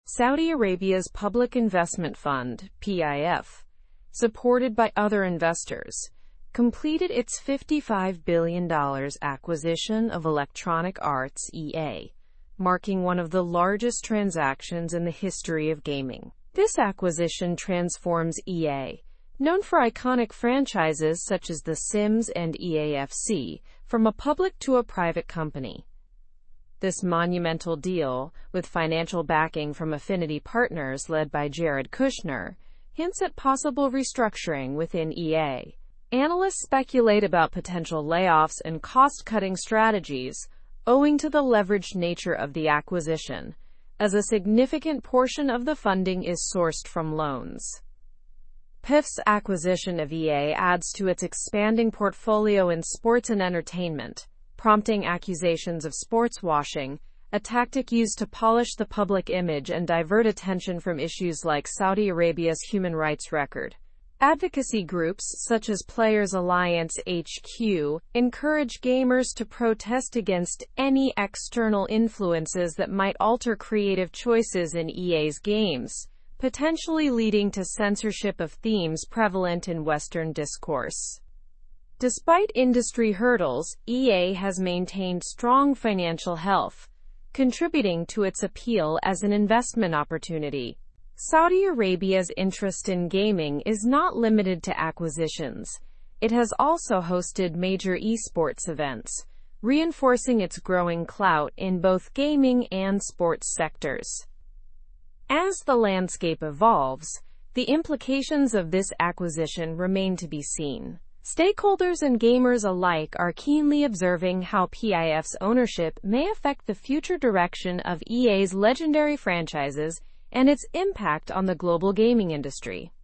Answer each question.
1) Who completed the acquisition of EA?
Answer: The acquisition was completed by Saudi Arabia's Public Investment Fund.

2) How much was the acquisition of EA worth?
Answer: The acquisition was worth $55 billion.

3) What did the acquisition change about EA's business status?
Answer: The acquisition changed EA from a public to a private company.

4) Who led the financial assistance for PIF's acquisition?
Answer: Financial assistance was led by Affinity Partners, under Jared Kushner.

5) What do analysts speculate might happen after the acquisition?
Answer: There is speculation about significant layoffs and cost-cutting measures.

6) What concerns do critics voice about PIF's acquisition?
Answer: Critics are concerned about sportswashing and potential censorship of game themes.

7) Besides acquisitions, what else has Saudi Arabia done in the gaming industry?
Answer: Saudi Arabia has hosted major esports events.

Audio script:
Saudi Arabia's Public Investment Fund (PIF), supported by other investors, completed its $55 billion acquisition of Electronic Arts (EA), marking one of the largest transactions in the history of gaming. This acquisition transforms EA, known for iconic franchises such as The Sims and EA FC, from a public to a private company.
This monumental deal, with financial backing from Affinity Partners led by Jared Kushner, hints at possible restructuring within EA. Analysts speculate about potential layoffs and cost-cutting strategies, owing to the leveraged nature of the acquisition, as a significant portion of the funding is sourced from loans.
PIF's acquisition of EA adds to its expanding portfolio in sports and entertainment, prompting accusations of sportswashing, a tactic used to polish the public image and divert attention from issues like Saudi Arabia's human rights record. Advocacy groups, such as Players Alliance HQ, encourage gamers to protest against any external influences that might alter creative choices in EA's games, potentially leading to censorship of themes prevalent in Western discourse.
Despite industry hurdles, EA has maintained strong financial health, contributing to its appeal as an investment opportunity. Saudi Arabia's interest in gaming is not limited to acquisitions; it has also hosted major esports events, reinforcing its growing clout in both gaming and sports sectors.
As the landscape evolves, the implications of this acquisition remain to be seen. Stakeholders and gamers alike are keenly observing how PIF's ownership may affect the future direction of EA's legendary franchises and its impact on the global gaming industry.

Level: Level 4